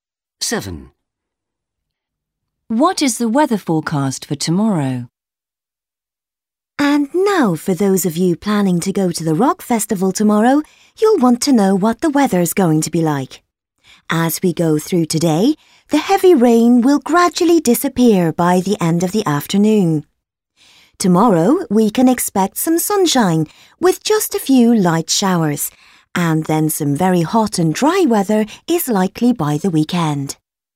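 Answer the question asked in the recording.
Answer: Some sunshine with a few light showers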